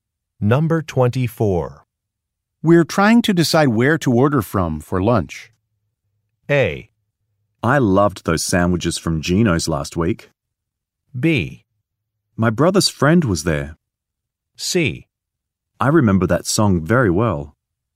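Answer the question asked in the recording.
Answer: A: I loved those sandwiches from Gino's last week.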